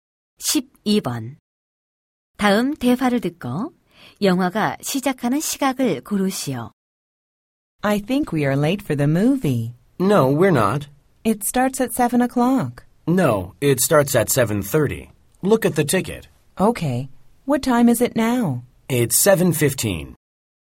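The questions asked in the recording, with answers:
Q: 다음 대화를 듣고 영화가 시작하는 시각을 고르시오.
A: 7시 30분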